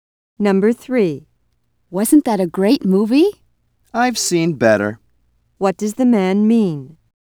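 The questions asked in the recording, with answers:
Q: What does the man mean?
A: He didn't think the movie was great.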